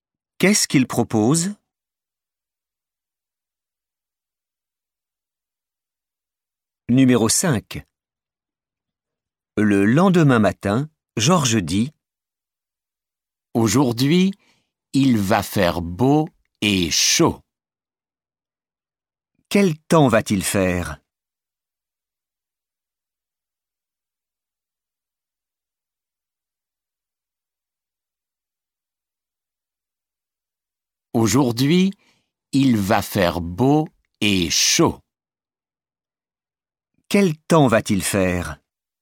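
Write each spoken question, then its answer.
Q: Quel temps va-t-il faire?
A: beau et chaud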